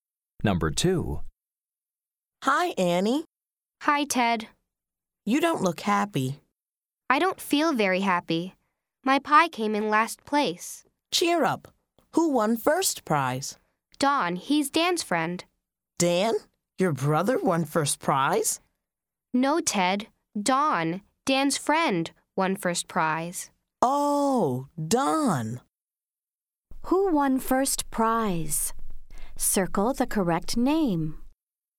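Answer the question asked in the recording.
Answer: Don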